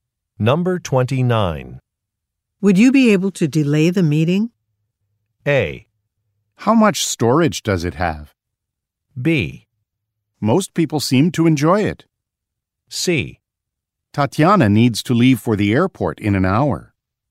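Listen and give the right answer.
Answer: C: Tatiana needs to leave for the airport in an hour.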